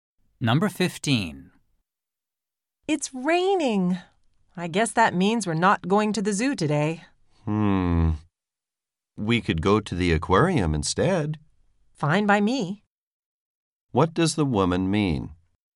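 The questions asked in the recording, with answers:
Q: What does the woman mean?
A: She agrees to go to the aquarium.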